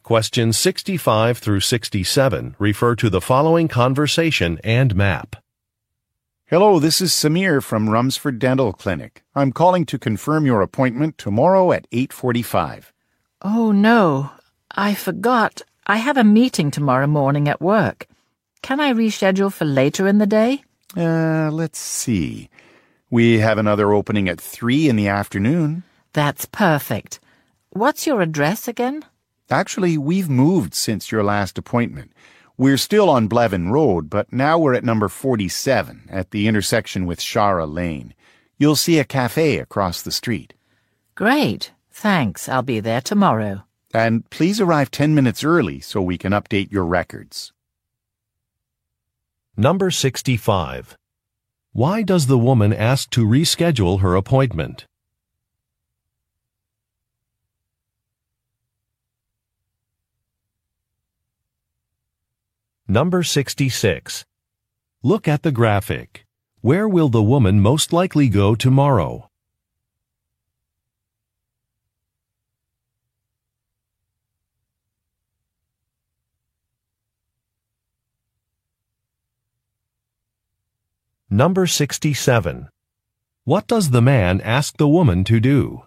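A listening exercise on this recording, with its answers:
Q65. Why does the woman ask to reschedule her appointment?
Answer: She has a business meeting.

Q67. What does the man ask the woman to do?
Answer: Come to an office early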